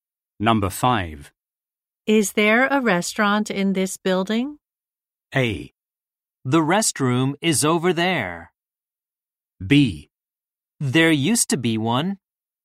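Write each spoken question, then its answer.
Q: Is there a restaurant in this building?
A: B: There used to be one.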